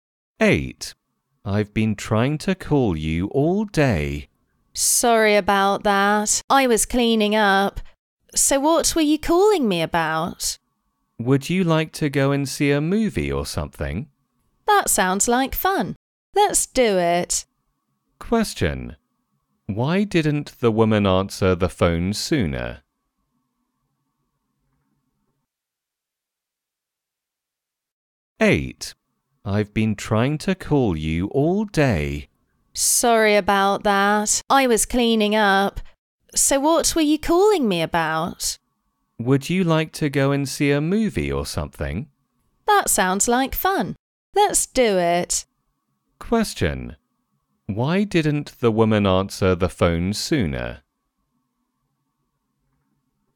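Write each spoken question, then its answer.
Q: Question. Why didn't the woman answer the phone sooner?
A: She was cleaning up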